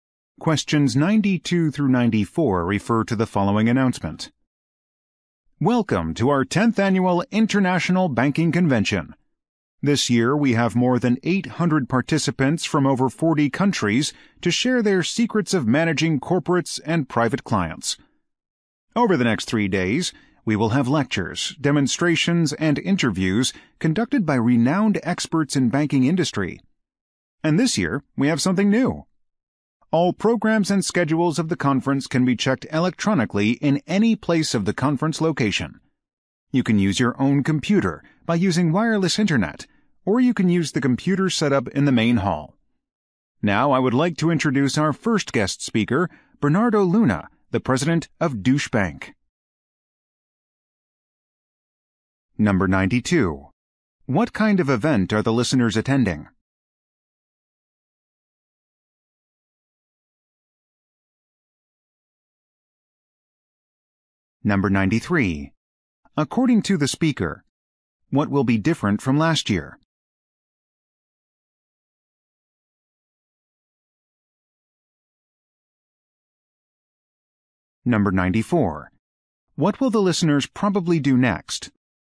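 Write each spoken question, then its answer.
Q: What kind of event are the listeners attending?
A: An international banking convention

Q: According to the speaker, what will be different from last year?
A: Programs and schedules can be checked electronically

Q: What will the listeners probably do next?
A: Listen to the first guest speaker, Bernardo Luna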